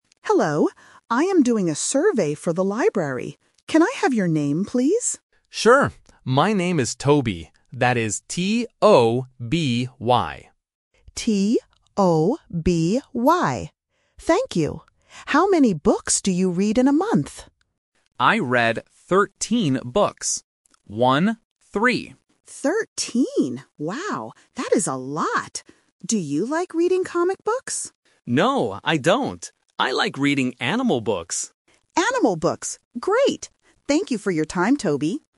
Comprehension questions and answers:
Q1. How do you spell the student's name?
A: T-O-B-Y

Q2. How many books does Toby read in a month?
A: 13

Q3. What kind of books does Toby like?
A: Animal books.

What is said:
Librarian: Hello. I am doing a survey for the library. Can I have your name, please?
Student: Sure. My name is Toby. That is T-O-B-Y.
Librarian: T-O-B-Y. Thank you. How many books do you read in a month?
Librarian: Thirteen. Wow, that is a lot! Do you like reading comic books?
Student: No, I don't. I like reading animal books.